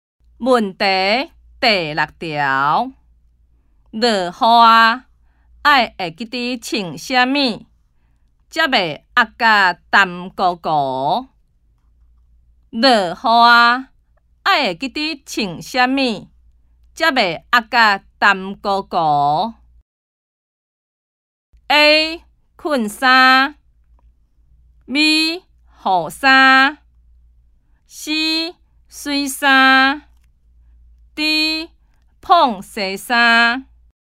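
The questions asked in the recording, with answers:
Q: 落雨啊,爱会记得穿什么,才袂压甲湿糊糊?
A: B: 雨衫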